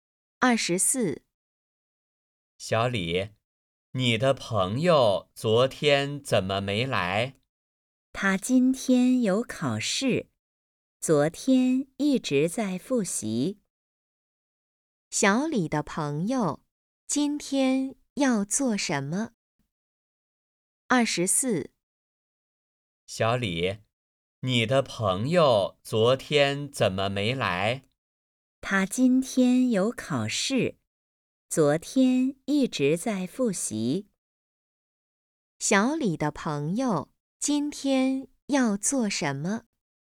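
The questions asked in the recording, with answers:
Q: 小李的朋友今天要做什么?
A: 考试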